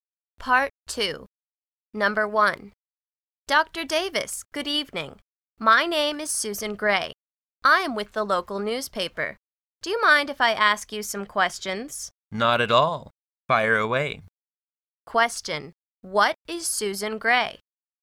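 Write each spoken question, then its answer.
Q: What is Susan Gray?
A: A newspaper reporter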